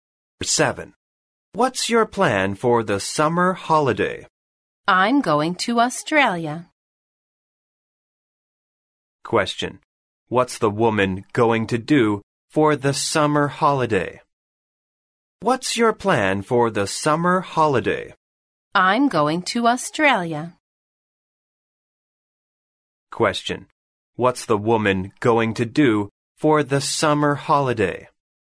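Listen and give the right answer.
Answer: Go to Australia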